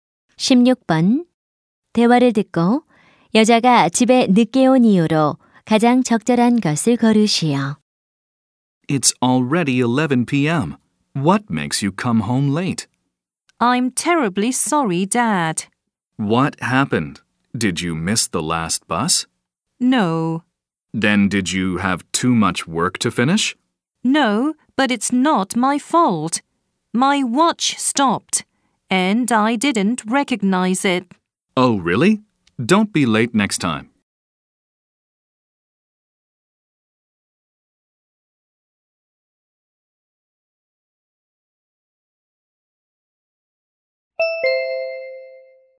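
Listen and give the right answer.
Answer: 시계가 멈춰서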